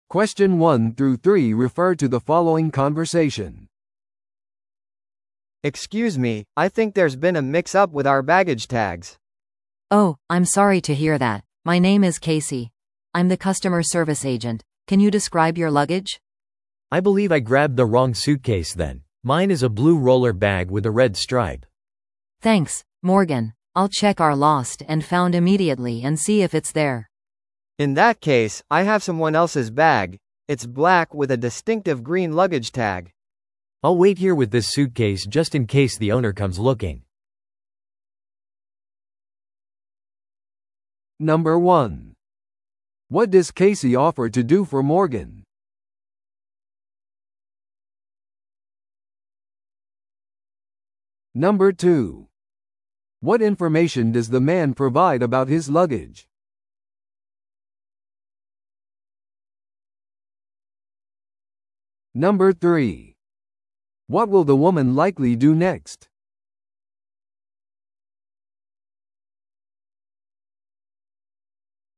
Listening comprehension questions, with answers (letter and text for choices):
Listen to the audio below and answer the questions.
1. What does Casey offer to do for Morgan?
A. 荷物保管エリアの中をチェックする。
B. 空港のセキュリティに間違いを報告する。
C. 遺失物取扱所でモーガンのバッグを探す。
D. 正しいものに荷物タグを更新する。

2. What information does the man provide about his luggage?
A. それは車輪が付いていて赤いストライプのある青色だ。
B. スーツケースのラゲッジタグがない。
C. 新しく買った黒いバッグだ。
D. 自分のものではないバッグを持っている。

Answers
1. C. 遺失物取扱所でモーガンのバッグを探す。
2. A. それは車輪が付いていて赤いストライプのある青色だ。

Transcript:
A: Excuse me, I think there's been a mix-up with our baggage tags.
B: Oh, I'm sorry to hear that. My name is Casey — I'm the customer service agent. Can you describe your luggage?
C: I believe I grabbed the wrong suitcase then. Mine is a blue roller bag with a red stripe.
B: Thanks, Morgan. I'll check our lost and found immediately and see if it's there.
A: In that case, I have someone else's bag; it's black with a distinctive green luggage tag.
C: I'll wait here with this suitcase just in case the owner comes looking.